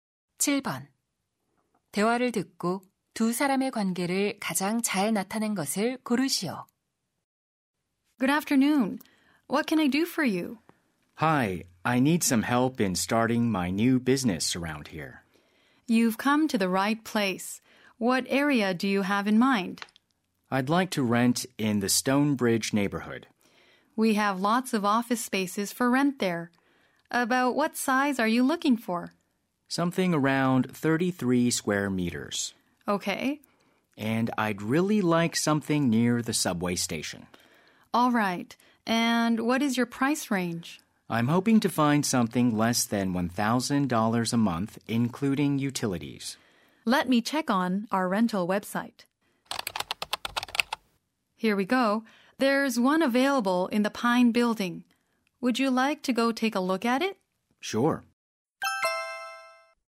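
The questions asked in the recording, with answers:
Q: 대화를 듣고 두 사람의 관계를 가장 잘 나타낸 것을 고르시오.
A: 부동산 중개인 - 사무실 임차 희망자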